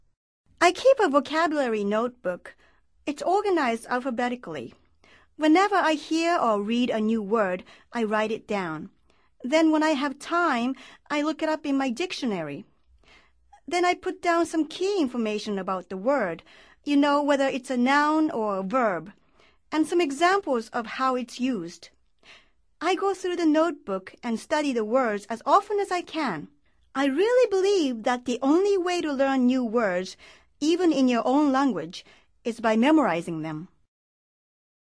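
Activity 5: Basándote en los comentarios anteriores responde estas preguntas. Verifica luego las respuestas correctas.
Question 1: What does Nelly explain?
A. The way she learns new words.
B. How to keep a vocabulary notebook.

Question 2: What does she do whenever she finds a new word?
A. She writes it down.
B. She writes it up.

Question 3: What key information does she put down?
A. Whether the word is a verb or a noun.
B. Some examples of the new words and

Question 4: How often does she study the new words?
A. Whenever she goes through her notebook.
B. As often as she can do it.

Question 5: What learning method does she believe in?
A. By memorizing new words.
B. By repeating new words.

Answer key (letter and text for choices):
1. A. The way she learns new words.
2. A. She writes it down.
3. B. Some examples of the new words and
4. B. As often as she can do it.
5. A. By memorizing new words.

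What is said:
I keep a vocabulary notebook. It's organized alphabetically. Whenever I hear or read a new word, I write it down. Then when I have time, I look it up in my dictionary. Then I put down some key information about the word – you know, whether it's a noun or a verb, and some examples of how it's used. I go through the notebook and study the words as often as I can. I really believe that the only way to learn new words – even in your own language – is by memorizing them.
VOCABULARY

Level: Nivel Avanzado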